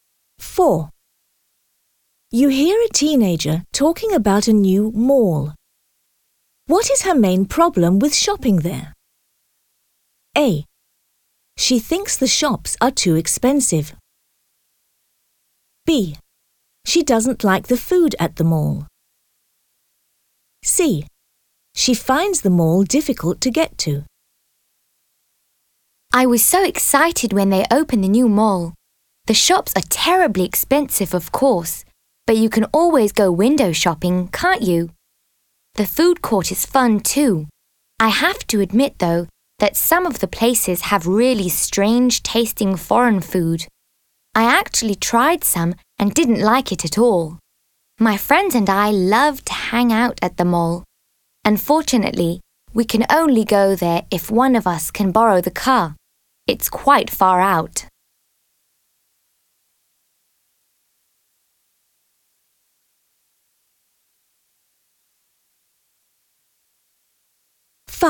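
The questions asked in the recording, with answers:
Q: What is her main problem with shopping there?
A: C: She finds the mall difficult to get to.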